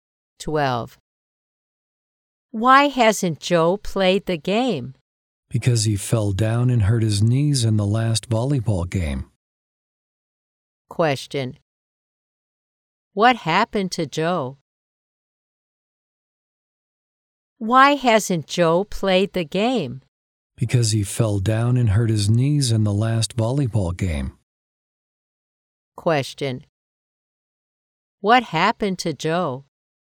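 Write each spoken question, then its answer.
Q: What happened to Joe?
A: He fell down and hurt his knees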